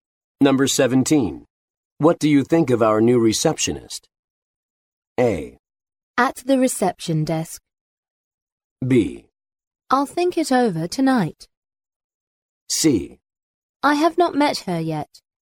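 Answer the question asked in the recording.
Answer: C: I have not met her yet.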